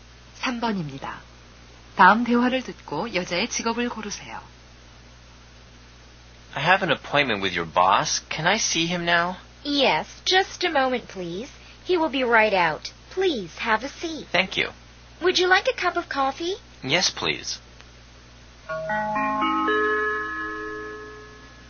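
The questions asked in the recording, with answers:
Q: 다음 대화를 듣고 여자의 직업을 고르세요.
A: 비서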